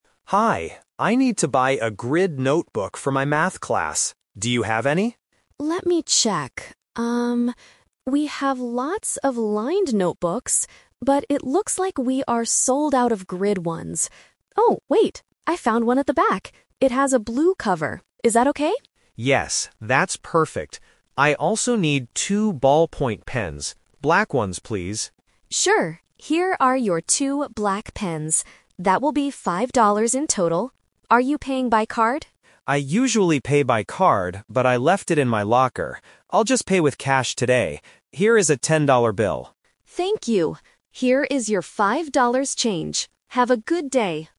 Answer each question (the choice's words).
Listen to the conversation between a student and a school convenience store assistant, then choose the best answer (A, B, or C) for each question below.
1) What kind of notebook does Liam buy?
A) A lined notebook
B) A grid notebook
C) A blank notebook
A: A grid notebook

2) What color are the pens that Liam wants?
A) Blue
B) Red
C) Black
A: Black

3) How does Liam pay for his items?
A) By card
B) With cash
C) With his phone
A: With cash

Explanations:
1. Liam asks for a grid notebook at the beginning, and the clerk eventually finds one for him. Why the traps are wrong: Option (A) is "The Trap". The clerk says they have lots of lined notebooks, but Liam doesn't buy them because he specifically needs a grid one for Math. Option (C) is a plausible type of notebook but is never mentioned.
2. Liam clearly asks the clerk, "I also need two ballpoint pens. Black ones, please." Why the traps are wrong: Option (A) is a "Detail Trap". Blue is mentioned in the audio ("It has a blue cover"), but it describes the notebook, not the pens. Option (B) is a plausible pen color but is not mentioned.
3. Liam says, "I'll just pay with cash today. Here is a ten-dollar bill." Why the traps are wrong: Option (A) is "The Twist Trap". The clerk asks if he is paying by card, and Liam says he usually does, but he left it in his locker. Option (C) is a plausible payment method but is not mentioned in the audio.

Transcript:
Liam: Hi. I need to buy a grid notebook for my Math class. Do you have any?
Clerk: Let me check. we have lots of lined notebooks, but it looks like we are sold out of grid ones. Oh, wait! I found one at the back. It has a blue cover. Is that okay?
Liam: Yes, that's perfect! I also need two ballpoint pens. Black ones, please.
Clerk: Sure, here are your two black pens. That will be $5 in total. Are you paying by card?
Liam: I usually pay by card, but I left it in my locker. I'll just pay with cash today.